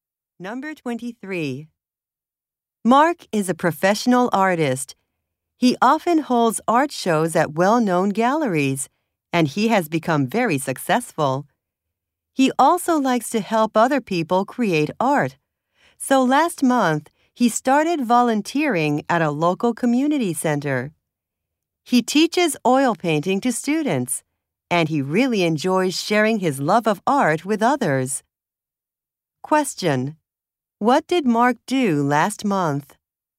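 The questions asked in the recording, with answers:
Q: What did Mark do last month?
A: Started volunteering at a community center, teaching oil painting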